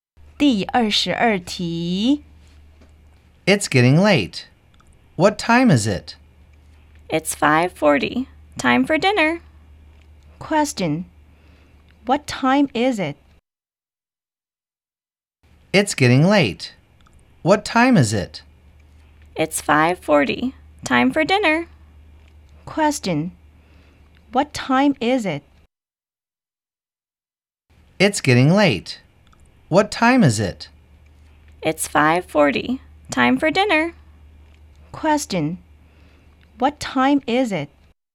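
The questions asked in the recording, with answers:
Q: Question. What time is it?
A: It's 5:40.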